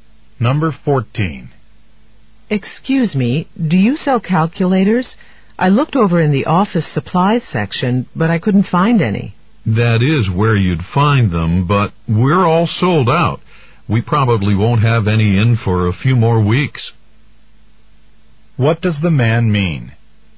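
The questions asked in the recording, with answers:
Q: What does the man mean?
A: The store has no calculators now.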